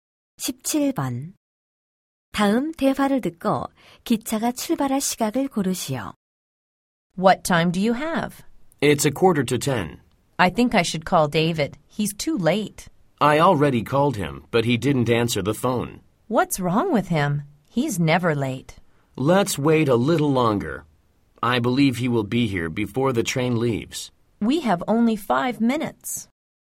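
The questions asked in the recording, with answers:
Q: 다음 대화를 듣고 기차가 출발할 시각을 고르시오.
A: 9시 50분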